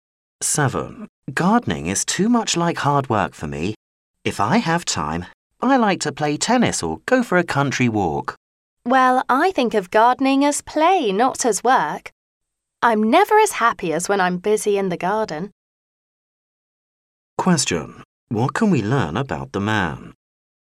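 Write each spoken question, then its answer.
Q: What can we learn about the man?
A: He enjoys gardening and sees it as play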